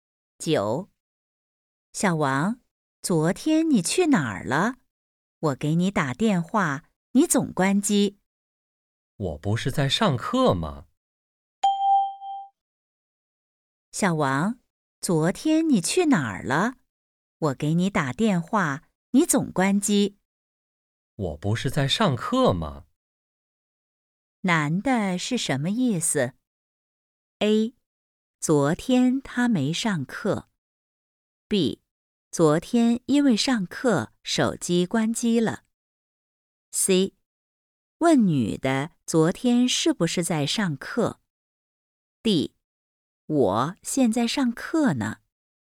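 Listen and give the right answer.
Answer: B: 昨天因为上课手机关机了。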